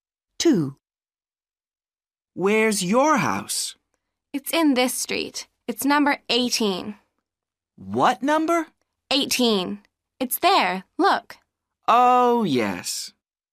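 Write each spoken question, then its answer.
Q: What number?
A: 18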